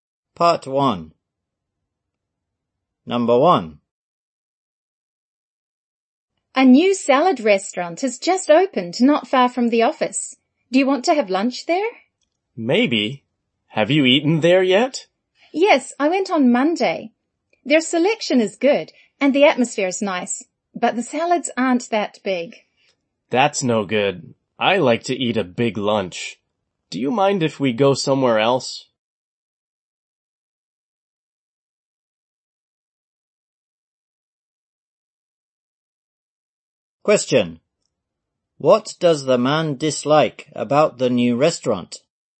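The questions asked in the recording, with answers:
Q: What does the man dislike about the new restaurant?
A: The salads aren't that big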